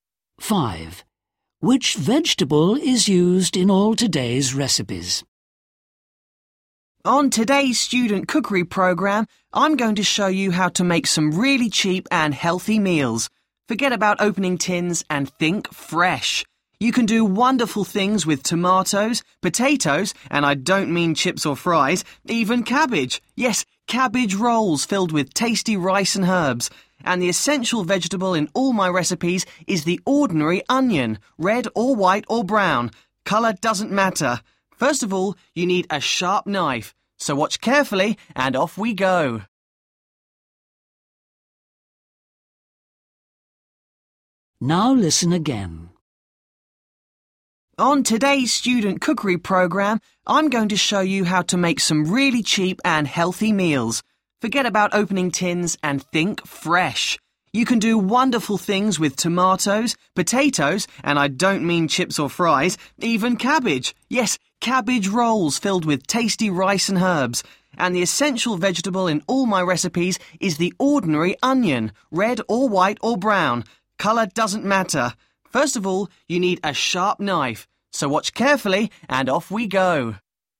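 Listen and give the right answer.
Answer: onion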